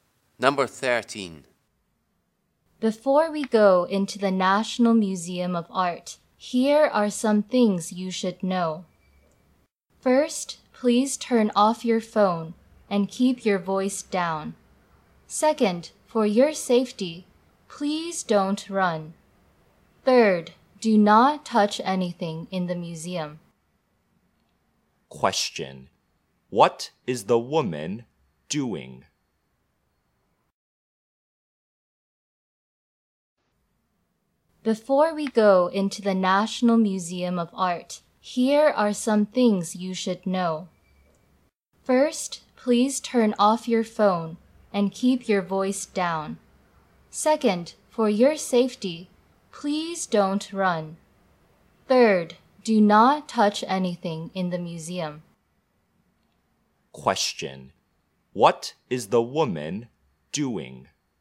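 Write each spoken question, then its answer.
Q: Question. What is the woman doing?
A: Telling visitors the museum rules before they go in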